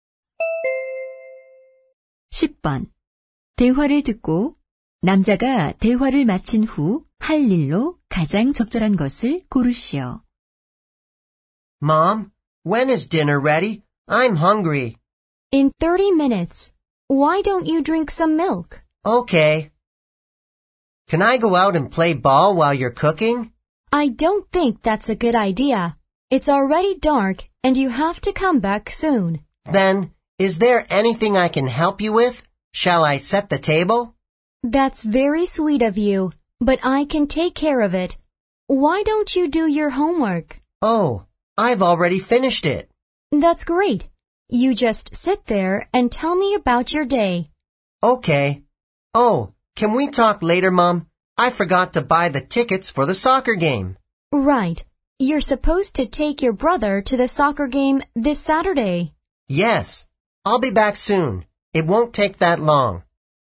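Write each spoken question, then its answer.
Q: 대화를 듣고 남자가 대화를 마친 후 할 일로 가장 적절한 것을 고르시오.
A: 축구 경기 표 사러 가기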